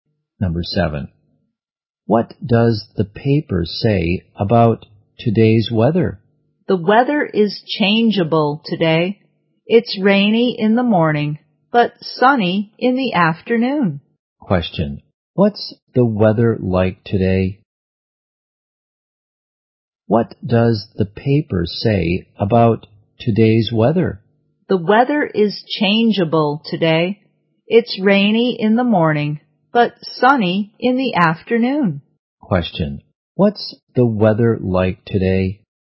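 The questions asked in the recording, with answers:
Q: What's the weather like today?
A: Changeable: rainy in the morning, sunny in the afternoon.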